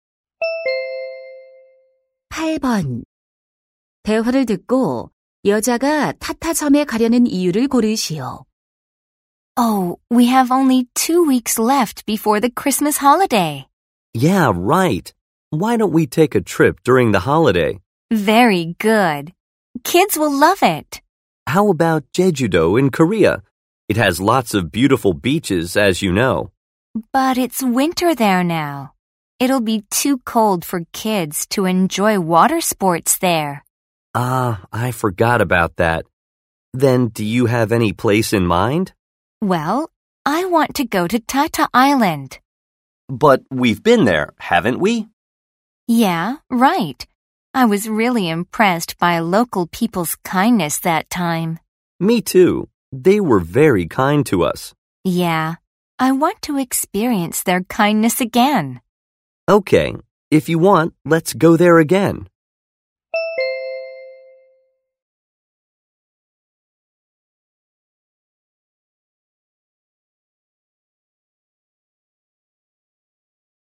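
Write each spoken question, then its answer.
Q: 대화를 듣고 여자가 타타섬에 가려는 이유를 고르시오.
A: 현지 사람들의 친절함을 다시 경험하고 싶어서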